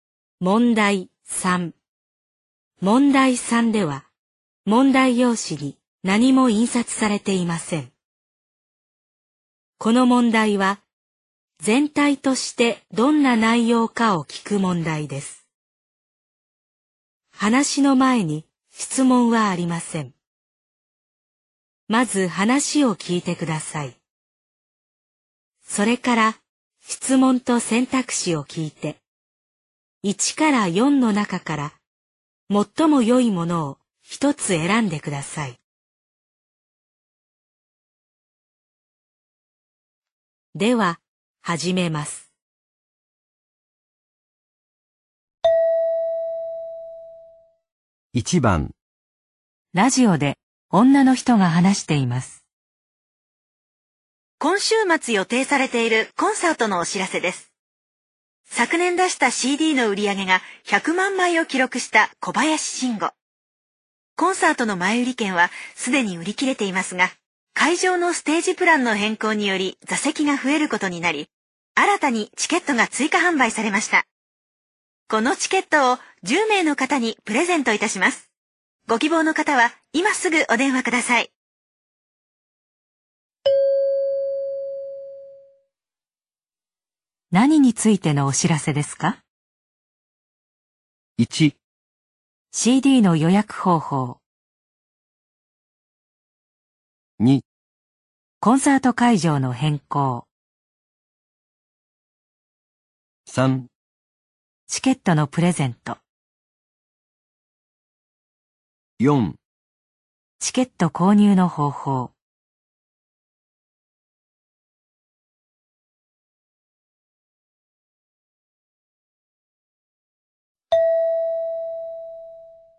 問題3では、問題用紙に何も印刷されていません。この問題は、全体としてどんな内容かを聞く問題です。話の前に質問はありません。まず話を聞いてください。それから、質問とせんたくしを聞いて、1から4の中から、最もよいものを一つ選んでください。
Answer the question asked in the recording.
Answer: 3

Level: N2 Listening · Test 12